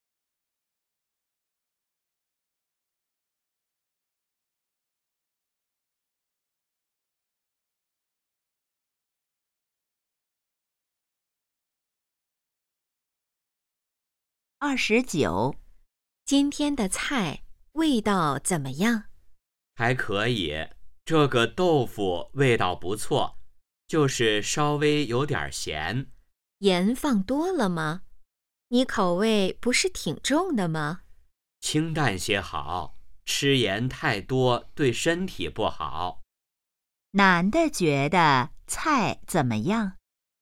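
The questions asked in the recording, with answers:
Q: 男的觉得菜怎么样?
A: 有点咸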